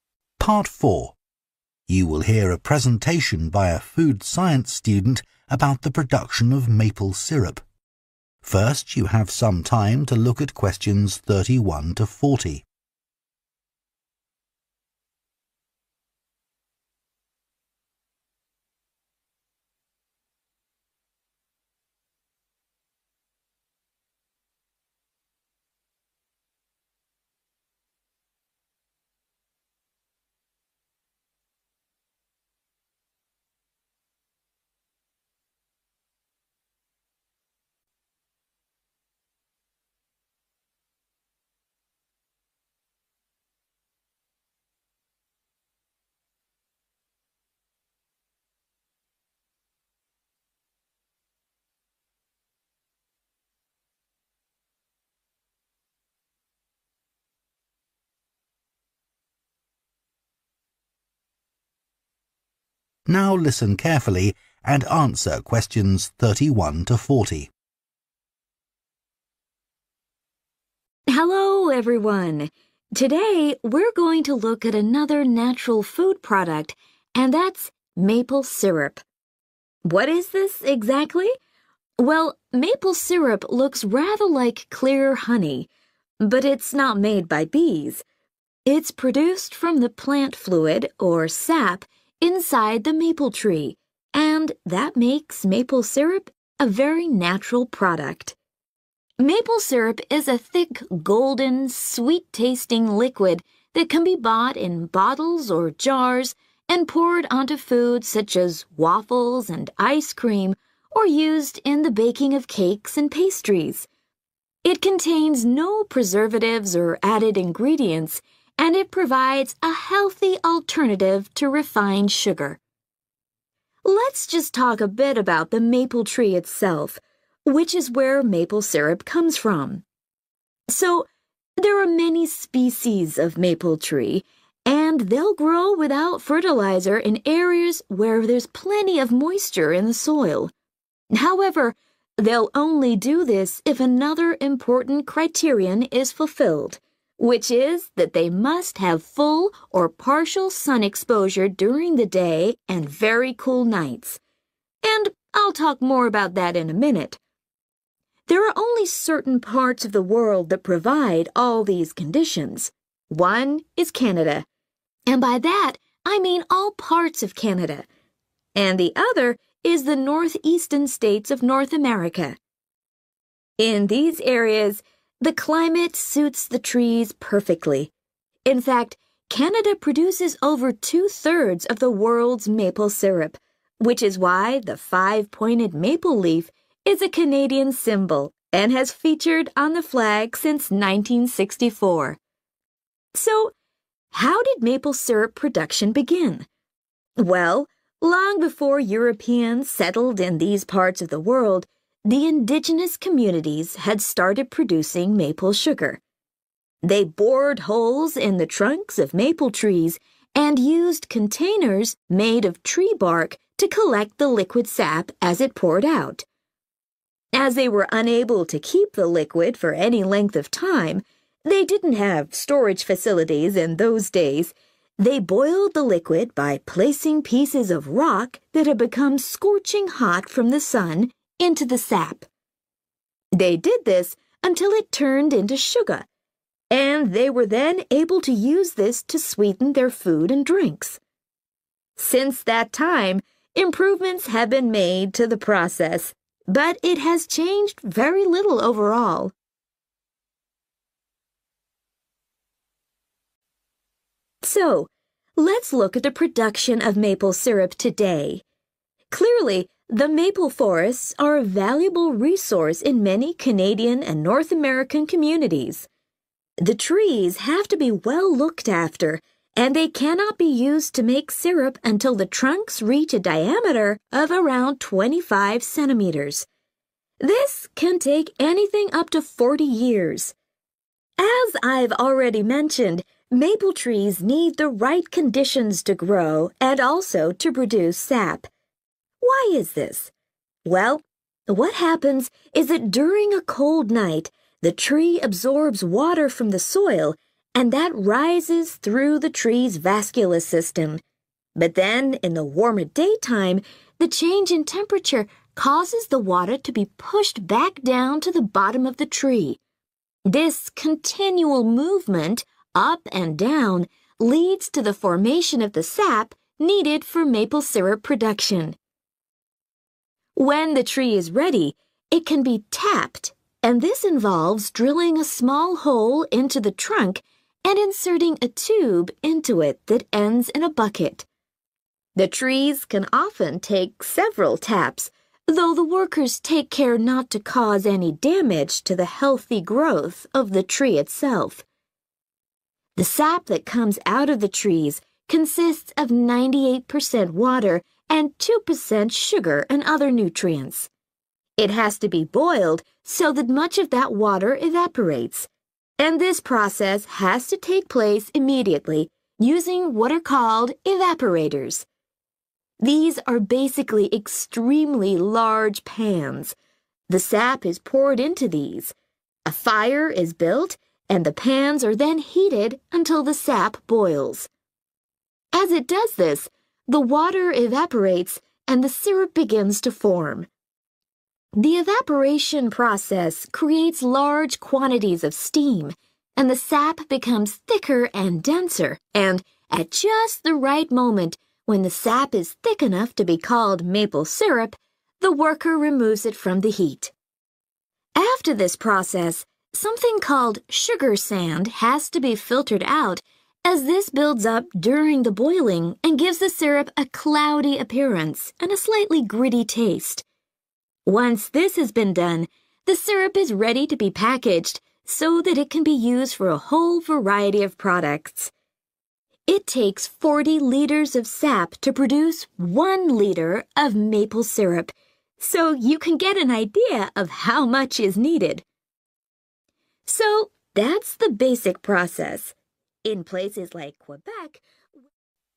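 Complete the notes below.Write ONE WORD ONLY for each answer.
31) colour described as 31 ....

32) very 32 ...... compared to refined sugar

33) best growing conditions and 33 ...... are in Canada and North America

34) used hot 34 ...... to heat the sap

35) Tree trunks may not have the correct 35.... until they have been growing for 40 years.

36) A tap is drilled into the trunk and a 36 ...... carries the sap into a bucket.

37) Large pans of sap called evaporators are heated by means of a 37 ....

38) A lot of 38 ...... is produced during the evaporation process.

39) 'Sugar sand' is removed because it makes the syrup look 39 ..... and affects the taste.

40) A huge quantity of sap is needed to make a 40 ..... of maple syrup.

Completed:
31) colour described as golden
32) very healthy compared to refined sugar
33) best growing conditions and climate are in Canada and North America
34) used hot rocks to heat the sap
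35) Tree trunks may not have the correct diameter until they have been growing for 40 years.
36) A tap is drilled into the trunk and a tube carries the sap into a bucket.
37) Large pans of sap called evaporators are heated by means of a fire
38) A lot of steam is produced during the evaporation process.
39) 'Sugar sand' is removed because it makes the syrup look cloudy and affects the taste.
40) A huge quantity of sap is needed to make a litre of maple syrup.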